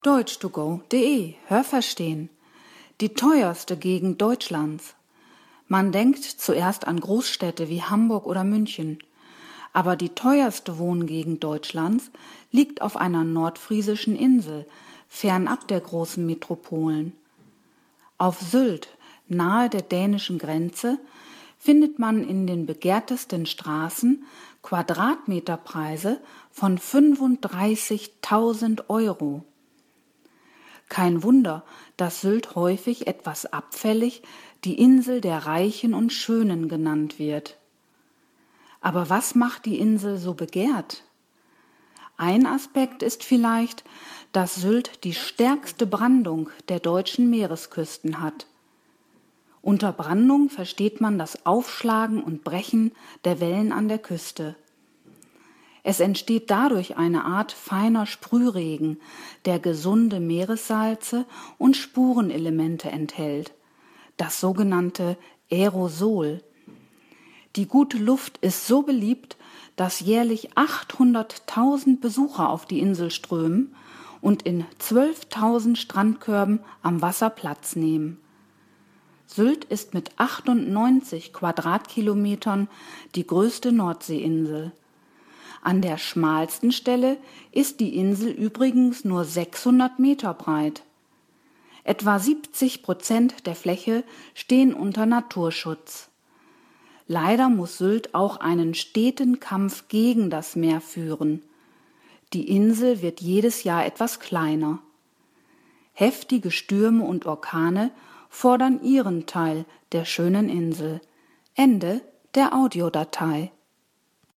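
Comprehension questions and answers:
Was haben Sie gehört? Es gibt nur eine korrekte Antwort.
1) Die teuerste Gegend Deutschlands ist ...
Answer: auf der nordfriesischen Insel Sylt

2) Auf Sylt zahlt man einen Preis von 35.000 Euro pro Quadratmeter ...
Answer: in den begehrtesten Straßen

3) Sylt hat die stärkste Brandung aller ...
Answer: deutschen Meeresküsten

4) Als Brandung bezeichnet man ...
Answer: das Aufschlagen und Brechen der Wellen an der Küste

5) Die Luft auf Sylt ist so gut, weil ...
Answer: der Sprühregen der Brandung gesunde Meeressalze und Spurenelemente enthält

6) 800.000 Menschen ...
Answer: besuchen die Insel jährlich

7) Auf Sylt gibt es 12.000 ...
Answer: Strandkörbe

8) An der schmalsten Stelle ist Sylt _____ Meter breit.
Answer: 600

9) Ungefähr 70 % der Inselfläche stehen ...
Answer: unter Naturschutz

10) Sylt wird jedes Jahr ...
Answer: etwas kleiner

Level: Hörtexte C (schwer)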